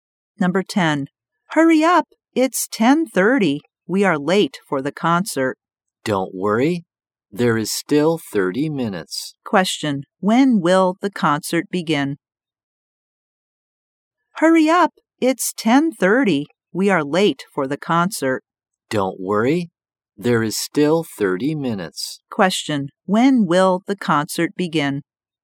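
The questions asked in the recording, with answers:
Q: When will the concert begin?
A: At 11:00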